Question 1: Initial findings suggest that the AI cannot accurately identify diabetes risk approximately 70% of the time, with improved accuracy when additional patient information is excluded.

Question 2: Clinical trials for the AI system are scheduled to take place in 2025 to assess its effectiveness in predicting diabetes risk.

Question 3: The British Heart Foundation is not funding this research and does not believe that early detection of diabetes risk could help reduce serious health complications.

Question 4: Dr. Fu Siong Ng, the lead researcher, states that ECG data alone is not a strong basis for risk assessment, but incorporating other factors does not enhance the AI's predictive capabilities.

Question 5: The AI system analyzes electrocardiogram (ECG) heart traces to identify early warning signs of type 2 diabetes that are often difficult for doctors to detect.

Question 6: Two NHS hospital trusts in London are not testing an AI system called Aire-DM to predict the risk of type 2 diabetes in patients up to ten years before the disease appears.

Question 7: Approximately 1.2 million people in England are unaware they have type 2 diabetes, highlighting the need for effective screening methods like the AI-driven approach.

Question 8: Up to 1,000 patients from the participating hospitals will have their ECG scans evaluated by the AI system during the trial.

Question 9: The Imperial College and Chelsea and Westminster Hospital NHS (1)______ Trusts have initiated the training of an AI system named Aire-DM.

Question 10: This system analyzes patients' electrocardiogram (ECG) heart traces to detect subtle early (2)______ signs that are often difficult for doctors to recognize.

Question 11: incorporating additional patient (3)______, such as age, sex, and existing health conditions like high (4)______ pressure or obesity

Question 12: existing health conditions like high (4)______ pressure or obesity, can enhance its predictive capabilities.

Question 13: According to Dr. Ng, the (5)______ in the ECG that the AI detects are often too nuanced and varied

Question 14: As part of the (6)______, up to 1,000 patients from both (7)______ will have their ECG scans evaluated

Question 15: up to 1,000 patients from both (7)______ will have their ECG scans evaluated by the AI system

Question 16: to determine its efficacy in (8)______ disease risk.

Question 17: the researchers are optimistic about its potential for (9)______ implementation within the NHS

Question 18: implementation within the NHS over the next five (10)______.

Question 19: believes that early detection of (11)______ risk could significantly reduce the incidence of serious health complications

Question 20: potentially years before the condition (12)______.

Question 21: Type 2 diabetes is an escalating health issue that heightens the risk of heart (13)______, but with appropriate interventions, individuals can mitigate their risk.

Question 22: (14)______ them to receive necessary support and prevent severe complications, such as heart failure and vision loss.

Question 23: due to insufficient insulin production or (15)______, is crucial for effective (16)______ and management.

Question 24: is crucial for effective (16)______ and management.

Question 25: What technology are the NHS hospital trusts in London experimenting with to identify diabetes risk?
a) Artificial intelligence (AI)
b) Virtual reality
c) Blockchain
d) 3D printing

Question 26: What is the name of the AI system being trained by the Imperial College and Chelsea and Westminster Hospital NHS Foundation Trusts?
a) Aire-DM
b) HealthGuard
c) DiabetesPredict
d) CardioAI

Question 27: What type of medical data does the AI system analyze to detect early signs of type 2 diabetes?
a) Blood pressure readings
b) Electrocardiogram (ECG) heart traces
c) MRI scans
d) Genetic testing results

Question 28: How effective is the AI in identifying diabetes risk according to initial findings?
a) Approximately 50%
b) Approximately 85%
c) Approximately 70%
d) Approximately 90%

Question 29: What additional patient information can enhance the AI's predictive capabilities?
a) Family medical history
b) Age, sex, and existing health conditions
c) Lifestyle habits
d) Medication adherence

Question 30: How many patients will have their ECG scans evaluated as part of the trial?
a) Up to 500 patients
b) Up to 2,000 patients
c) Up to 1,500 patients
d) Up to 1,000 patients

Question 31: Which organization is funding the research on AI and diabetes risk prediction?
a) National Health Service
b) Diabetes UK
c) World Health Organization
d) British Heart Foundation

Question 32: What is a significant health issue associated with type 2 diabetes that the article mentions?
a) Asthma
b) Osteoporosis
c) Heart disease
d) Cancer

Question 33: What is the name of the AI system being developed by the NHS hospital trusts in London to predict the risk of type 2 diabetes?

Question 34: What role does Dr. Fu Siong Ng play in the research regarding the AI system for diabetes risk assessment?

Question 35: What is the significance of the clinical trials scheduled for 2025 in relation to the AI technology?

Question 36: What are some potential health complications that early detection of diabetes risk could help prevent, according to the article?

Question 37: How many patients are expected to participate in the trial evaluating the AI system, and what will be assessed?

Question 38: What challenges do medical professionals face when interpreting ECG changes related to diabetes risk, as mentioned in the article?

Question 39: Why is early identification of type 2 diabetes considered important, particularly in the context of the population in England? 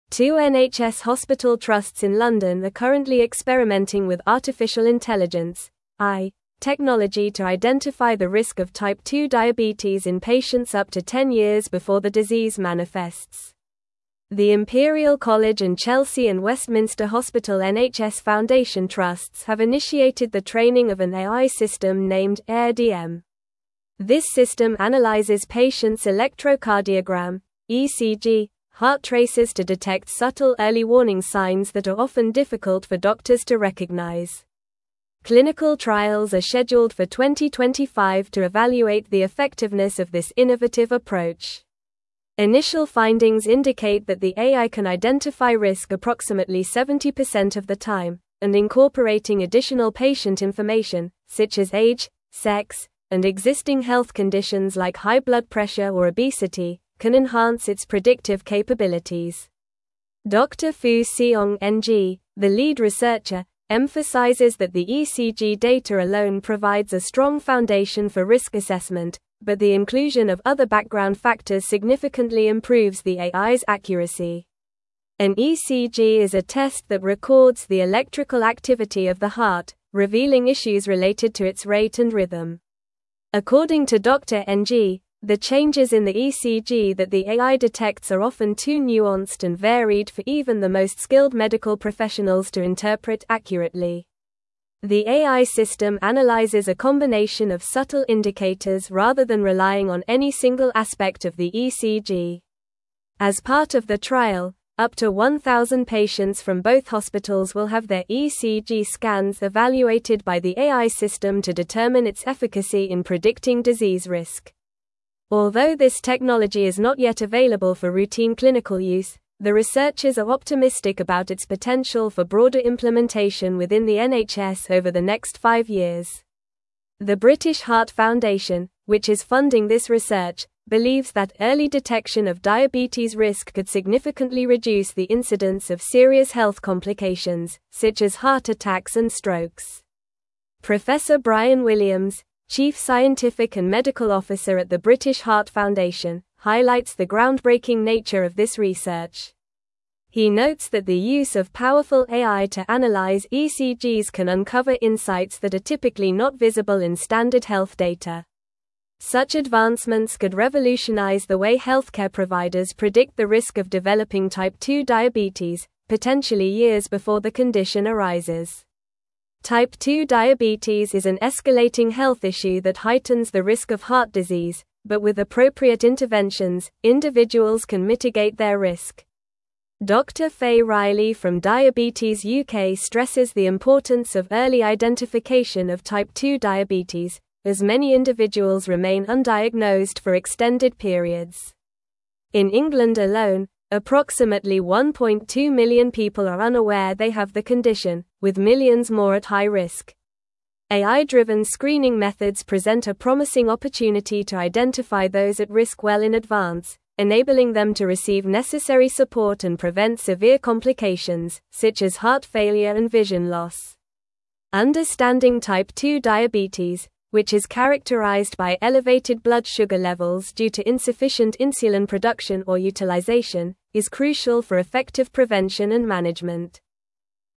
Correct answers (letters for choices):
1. False
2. True
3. False
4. False
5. True
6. False
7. True
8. True
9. Foundation
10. warning
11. information
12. blood
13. changes
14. trial
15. hospitals
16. predicting
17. broader
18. years
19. diabetes
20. arises
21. disease
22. enabling
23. utilization
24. prevention
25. a
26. a
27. b
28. c
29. b
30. d
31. d
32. c
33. The AI system is named Aire-DM.
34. Dr. Fu Siong Ng is the lead researcher for the project.
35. The clinical trials scheduled for 2025 will evaluate the effectiveness of the AI technology in predicting the risk of type 2 diabetes.
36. Early detection of diabetes risk could help prevent serious health complications such as heart attacks and strokes.
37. Up to 1,000 patients are expected to participate in the trial, and their ECG scans will be evaluated by the AI system to determine its efficacy in predicting disease risk.
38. Medical professionals face challenges in interpreting the subtle and nuanced changes in ECG that the AI detects, which are often too varied for even skilled professionals to interpret accurately.
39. Early identification of type 2 diabetes is important because many individuals remain undiagnosed for extended periods, and approximately 1.2 million people in England are unaware they have the condition, with millions more at high risk.

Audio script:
Two NHS hospital trusts in London are currently experimenting with artificial intelligence (AI) technology to identify the risk of type 2 diabetes in patients up to ten years before the disease manifests. The Imperial College and Chelsea and Westminster Hospital NHS Foundation Trusts have initiated the training of an AI system named Aire-DM. This system analyzes patients' electrocardiogram (ECG) heart traces to detect subtle early warning signs that are often difficult for doctors to recognize. Clinical trials are scheduled for 2025 to evaluate the effectiveness of this innovative approach. Initial findings indicate that the AI can identify risk approximately 70% of the time, and incorporating additional patient information, such as age, sex, and existing health conditions like high blood pressure or obesity, can enhance its predictive capabilities.
Dr. Fu Siong Ng, the lead researcher, emphasizes that the ECG data alone provides a strong foundation for risk assessment, but the inclusion of other background factors significantly improves the AI's accuracy. An ECG is a test that records the electrical activity of the heart, revealing issues related to its rate and rhythm. According to Dr. Ng, the changes in the ECG that the AI detects are often too nuanced and varied for even the most skilled medical professionals to interpret accurately. The AI system analyzes a combination of subtle indicators rather than relying on any single aspect of the ECG.
As part of the trial, up to 1,000 patients from both hospitals will have their ECG scans evaluated by the AI system to determine its efficacy in predicting disease risk. Although this technology is not yet available for routine clinical use, the researchers are optimistic about its potential for broader implementation within the NHS over the next five years. The British Heart Foundation, which is funding this research, believes that early detection of diabetes risk could significantly reduce the incidence of serious health complications, such as heart attacks and strokes.
Professor Bryan Williams, Chief Scientific and Medical Officer at the British Heart Foundation, highlights the groundbreaking nature of this research. He notes that the use of powerful AI to analyze ECGs can uncover insights that are typically not visible in standard health data. Such advancements could revolutionize the way healthcare providers predict the risk of developing type 2 diabetes, potentially years before the condition arises. Type 2 diabetes is an escalating health issue that heightens the risk of heart disease, but with appropriate interventions, individuals can mitigate their risk.
Dr. Faye Riley from Diabetes UK stresses the importance of early identification of type 2 diabetes, as many individuals remain undiagnosed for extended periods. In England alone, approximately 1.2 million people are unaware they have the condition, with millions more at high risk. AI-driven screening methods present a promising opportunity to identify those at risk well in advance, enabling them to receive necessary support and prevent severe complications, such as heart failure and vision loss. Understanding type 2 diabetes, which is characterized by elevated blood sugar levels due to insufficient insulin production or utilization, is crucial for effective prevention and management.